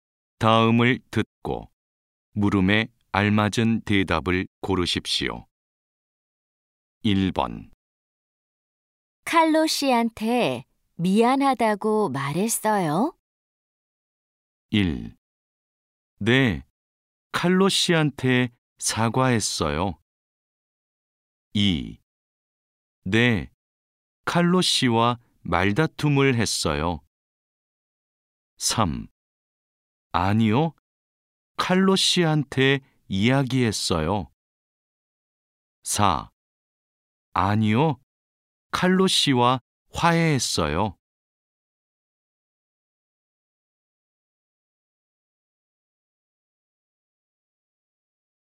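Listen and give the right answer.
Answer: 1: 네, 칼로 씨한테 사과했어요.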